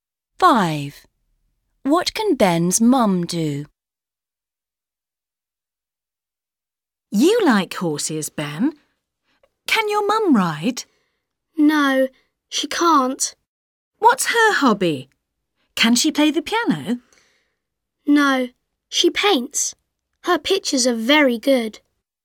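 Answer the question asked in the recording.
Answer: paint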